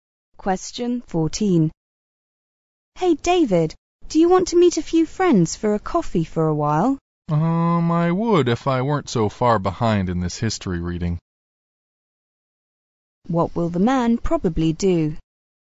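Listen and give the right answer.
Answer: Stay and do his history reading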